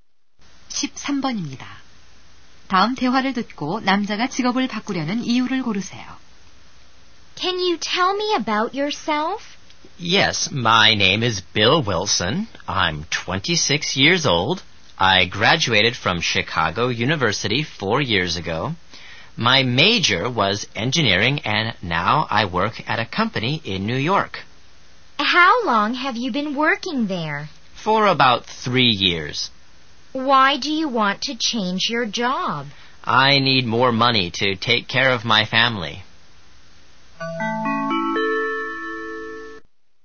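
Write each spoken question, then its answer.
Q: 다음 대화를 듣고 남자가 직업을 바꾸려는 이유를 고르세요.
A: 가족을 부양할 돈이 더 필요해서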